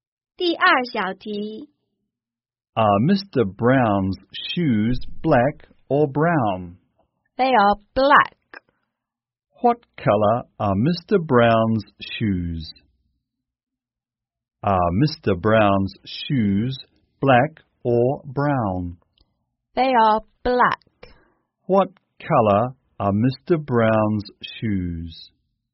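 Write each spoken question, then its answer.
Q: What color are Mr. Brown's shoes?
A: Black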